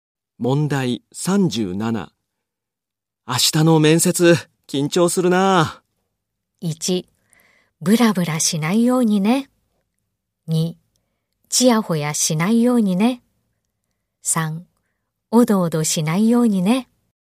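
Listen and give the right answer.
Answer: 3: おどおどしないようにね。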